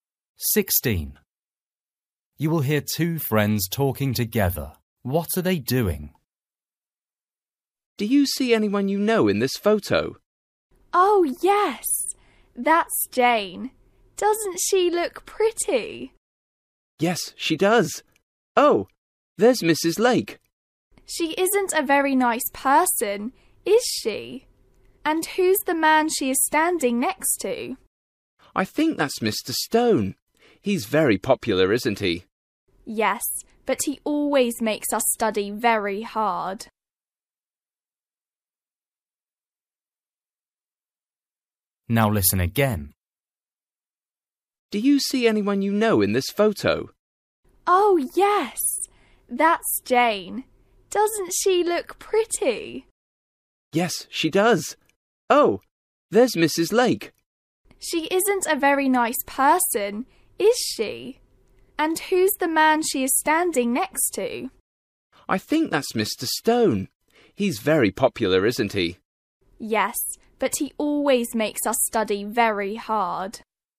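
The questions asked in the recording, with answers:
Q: What are they doing?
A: Looking at a photo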